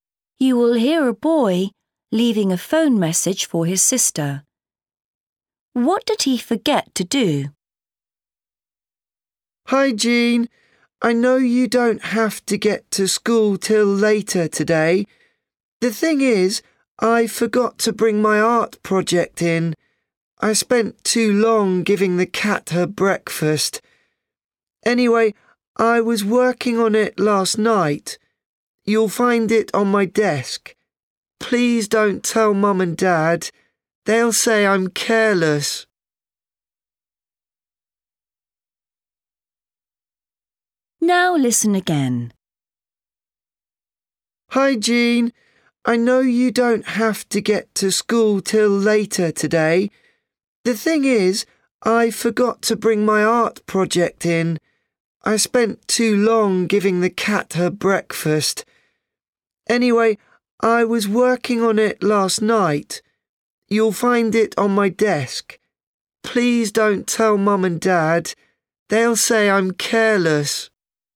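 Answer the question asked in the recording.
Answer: Bring his art project to school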